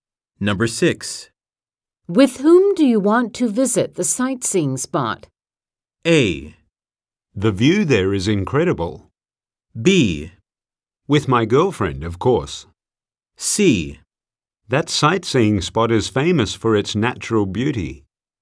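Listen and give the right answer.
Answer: B: With my girlfriend, of course.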